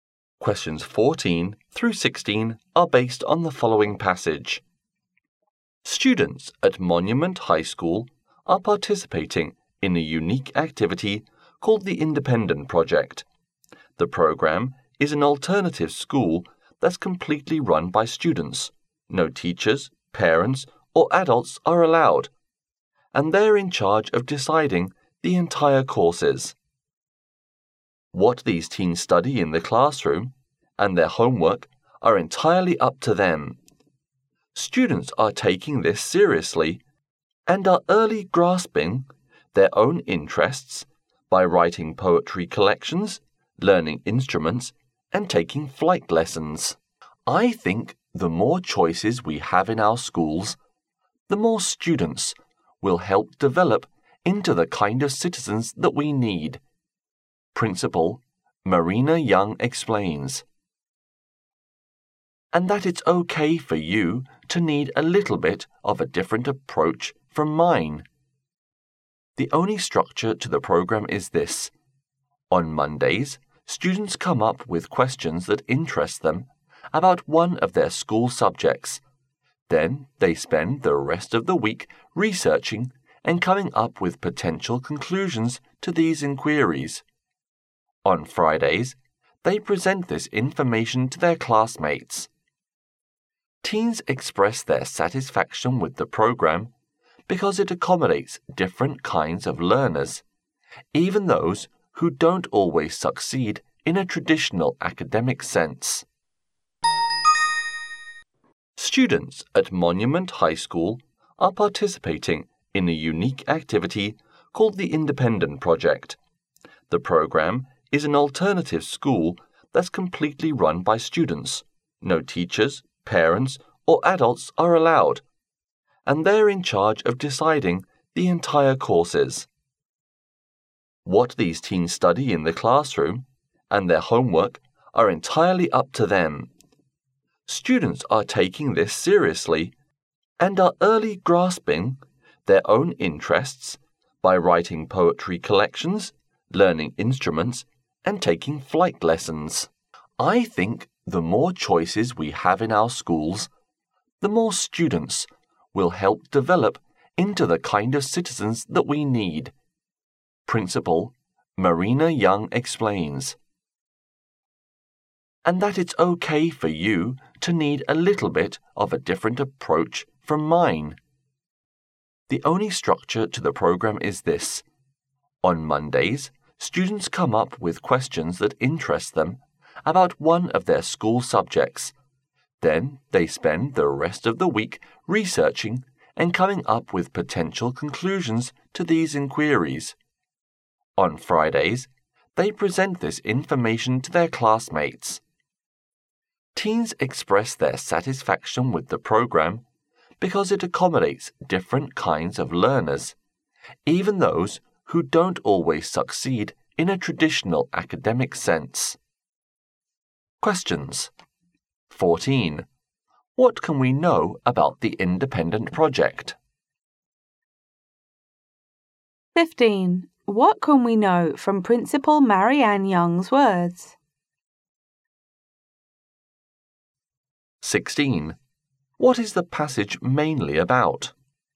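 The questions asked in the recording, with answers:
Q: What can we know about the independent project?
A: It is completely run by students

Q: What is the passage mainly about?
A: A student-run independent project at Monument High School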